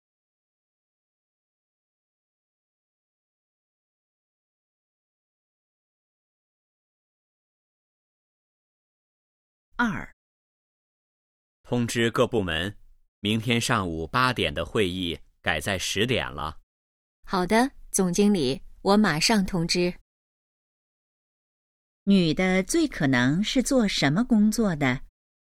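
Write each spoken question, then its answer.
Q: 女的最可能是做什么工作的?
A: 秘书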